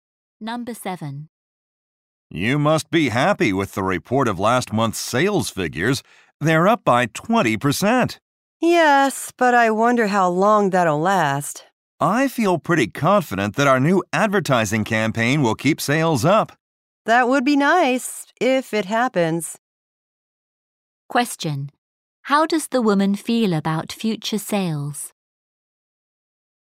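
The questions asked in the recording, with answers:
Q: How does the woman feel about future sales?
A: She doubts the increase will last.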